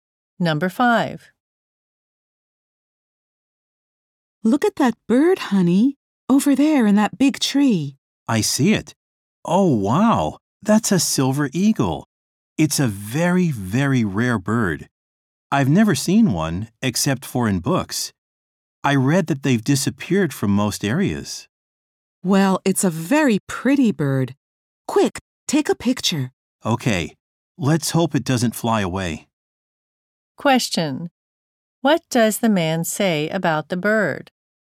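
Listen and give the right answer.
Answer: It is very rare.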